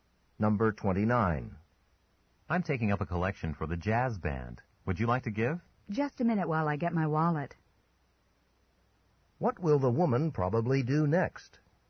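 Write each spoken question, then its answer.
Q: What will the woman probably do next?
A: Give money for the jazz band.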